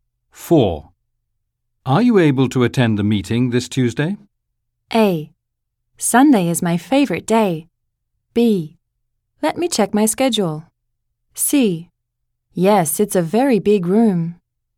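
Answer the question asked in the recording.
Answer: B: Let me check my schedule.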